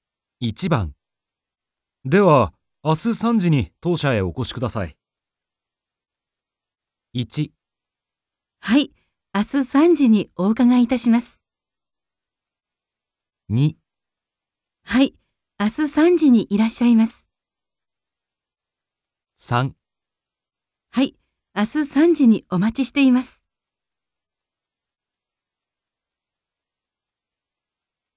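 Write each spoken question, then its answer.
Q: では明日3時に当社へお越しください。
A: 1: はい、明日3時にお伺いいたします。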